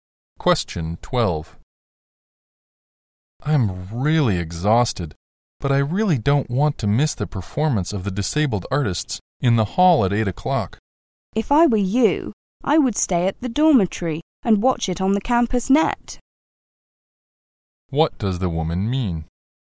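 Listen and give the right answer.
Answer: He should stay in the dormitory and watch the performance on the campus net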